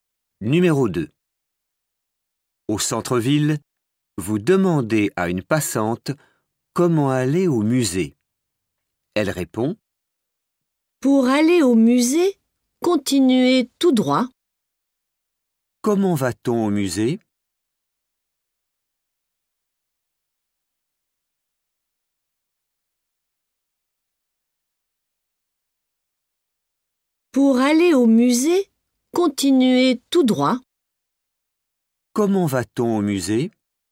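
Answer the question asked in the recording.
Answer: continuer tout droit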